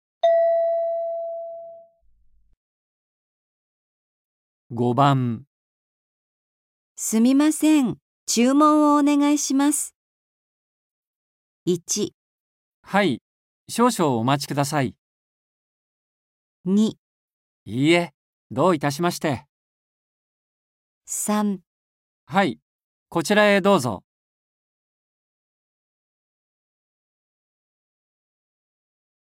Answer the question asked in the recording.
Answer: 1

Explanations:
F: すみません、注文をお願いします。 M: 1. はい、少々お待ちください。 2. いいえ、どういたしまして。 3. はい、こちらへどうぞ。

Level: N4